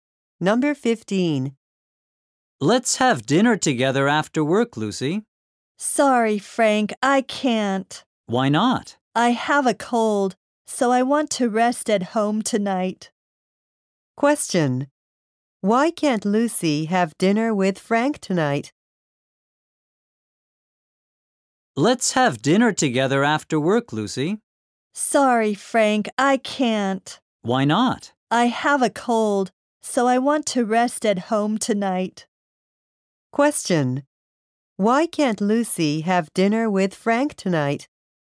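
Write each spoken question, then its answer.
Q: Why can't Lucy have dinner with Frank tonight?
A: She has a cold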